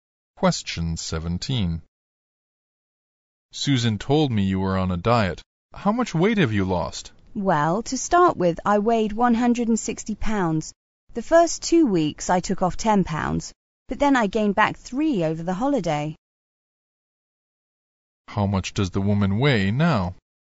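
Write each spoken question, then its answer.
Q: How much does the woman weigh now?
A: 153 pounds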